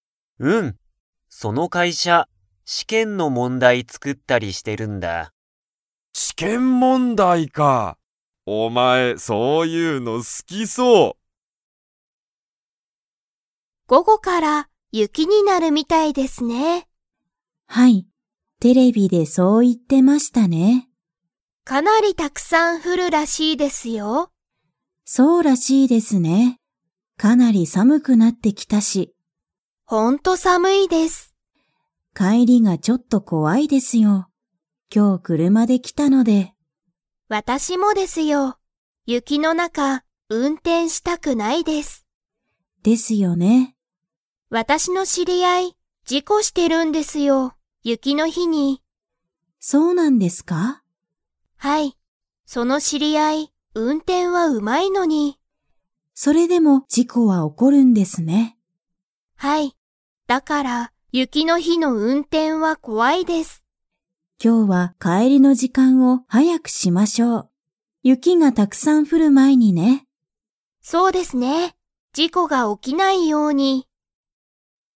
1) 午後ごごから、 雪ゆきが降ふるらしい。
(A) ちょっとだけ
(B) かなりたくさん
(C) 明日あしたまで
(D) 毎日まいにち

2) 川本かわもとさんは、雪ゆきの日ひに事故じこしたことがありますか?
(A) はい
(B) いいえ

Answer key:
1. B
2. B

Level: Level 4

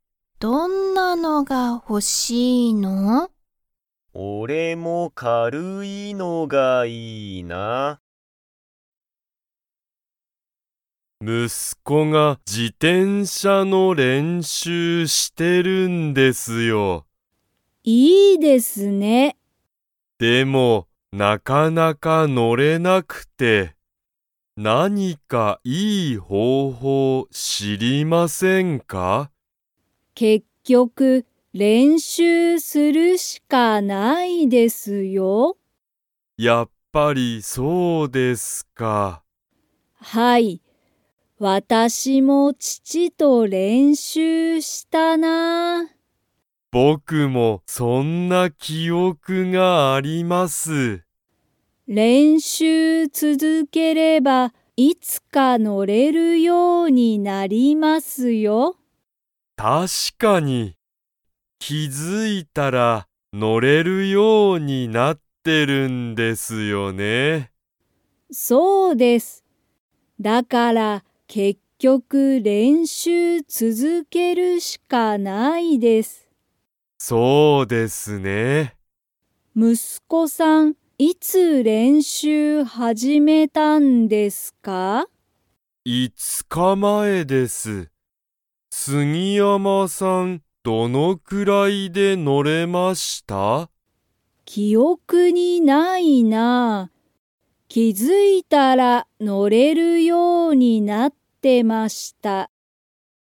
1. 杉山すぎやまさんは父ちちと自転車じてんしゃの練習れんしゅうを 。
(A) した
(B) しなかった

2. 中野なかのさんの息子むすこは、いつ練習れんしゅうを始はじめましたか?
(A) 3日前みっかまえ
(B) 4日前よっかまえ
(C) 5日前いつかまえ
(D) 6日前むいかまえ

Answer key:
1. A
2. C

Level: Level 3

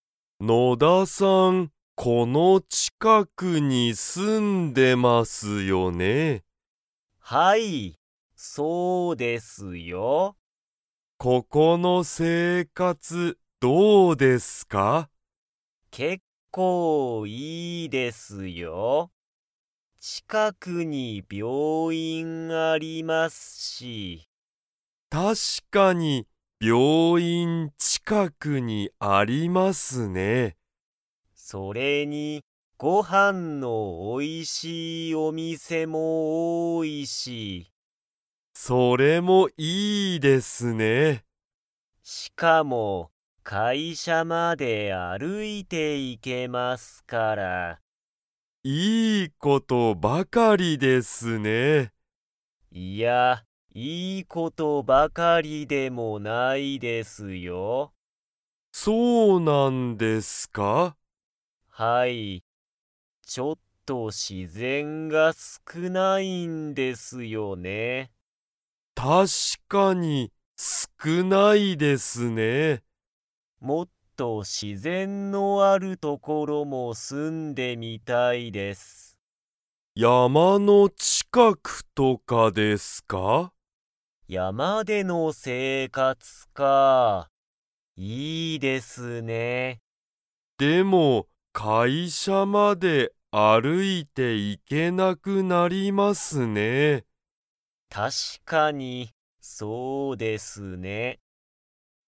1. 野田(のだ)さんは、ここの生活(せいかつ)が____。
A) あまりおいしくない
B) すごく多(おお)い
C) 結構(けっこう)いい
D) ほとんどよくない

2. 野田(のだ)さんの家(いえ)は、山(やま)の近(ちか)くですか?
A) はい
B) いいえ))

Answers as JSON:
{"1": "C", "2": "B"}

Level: Level 2

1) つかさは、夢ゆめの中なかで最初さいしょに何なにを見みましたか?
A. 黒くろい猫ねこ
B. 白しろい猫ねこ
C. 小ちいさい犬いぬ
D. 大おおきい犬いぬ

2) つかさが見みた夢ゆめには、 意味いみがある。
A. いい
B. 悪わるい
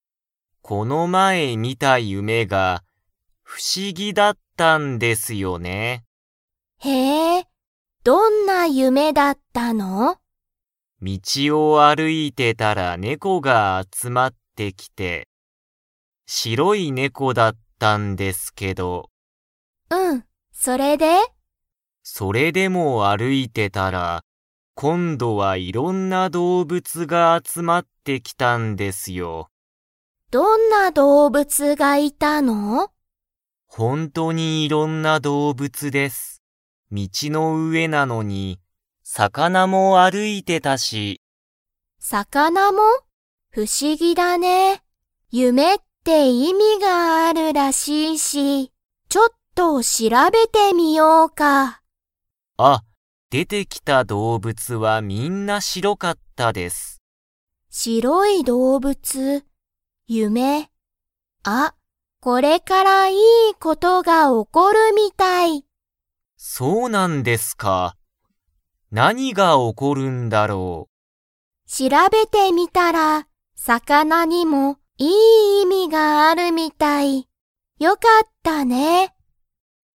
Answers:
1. B
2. A

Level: Level 3

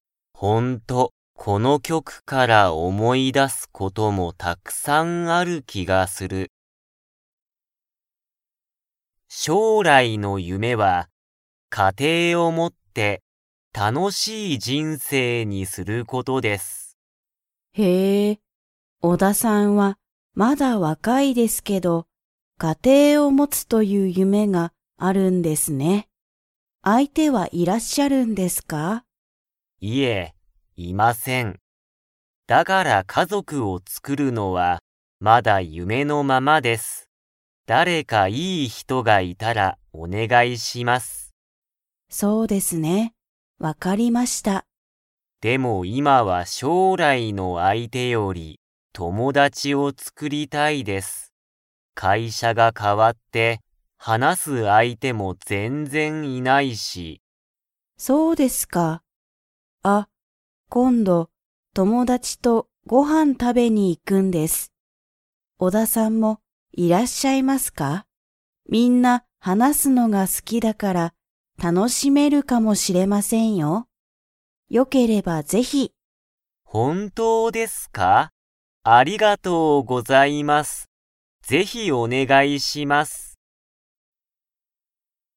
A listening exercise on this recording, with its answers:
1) オダさんは、将来しょうらい何なにを持もちたいと思おもっていますか?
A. 家庭かてい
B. 夢ゆめ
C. ご飯はん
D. 楽たのしみ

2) オダさんは、みんなでご飯はんに 。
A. 行いきたい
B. 行いきたくない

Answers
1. A
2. A

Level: Level 3

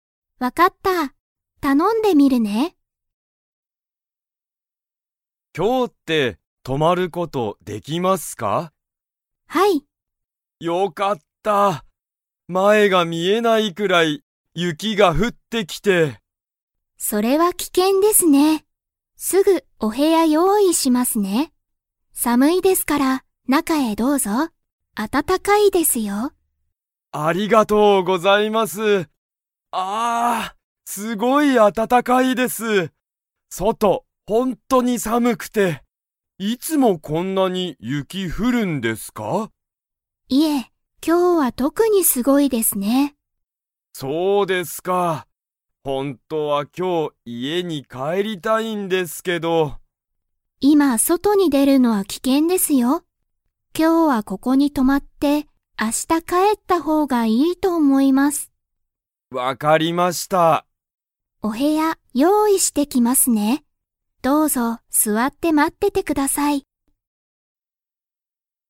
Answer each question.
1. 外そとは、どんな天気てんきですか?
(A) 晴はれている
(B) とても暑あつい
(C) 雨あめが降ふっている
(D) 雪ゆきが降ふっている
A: D

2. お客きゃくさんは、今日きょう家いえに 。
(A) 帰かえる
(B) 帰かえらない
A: B

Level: Level 4

